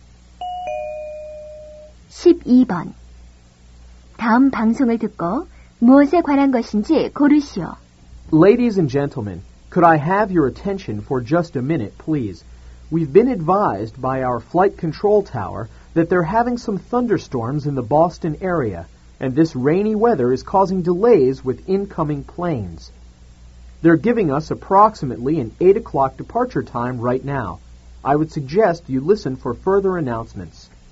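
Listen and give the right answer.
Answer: 뇌우로 인한 비행기 출발 지연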